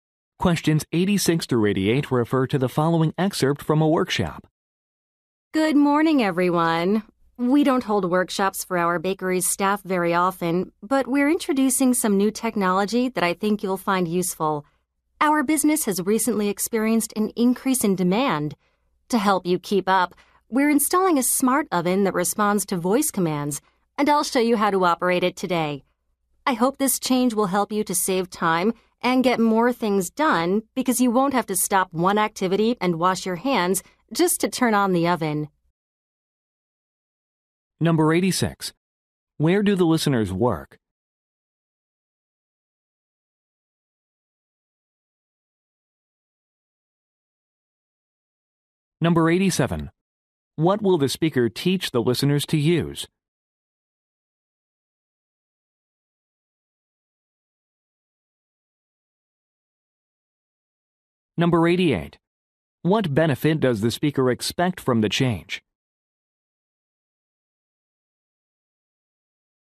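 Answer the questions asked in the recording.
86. At a bakery
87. A voice-controlled smart oven
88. Saving time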